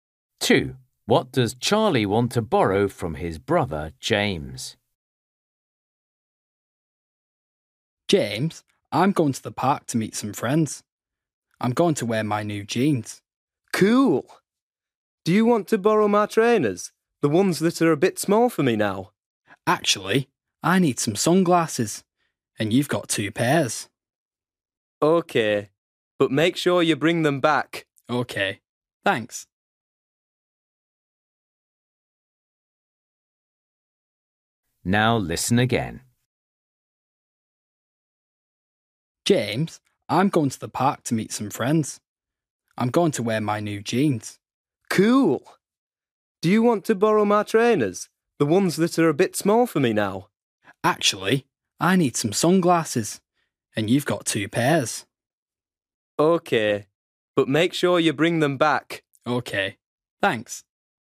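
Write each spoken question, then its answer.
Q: What does Charlie want to borrow from his brother, James?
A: Sunglasses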